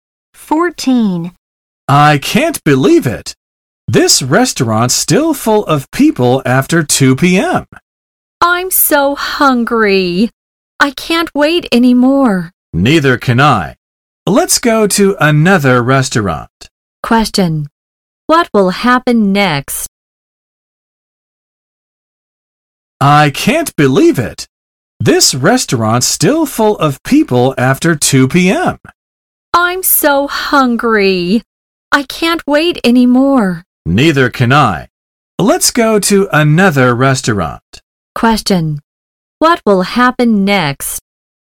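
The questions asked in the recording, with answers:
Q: What will happen next?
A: They will go to another restaurant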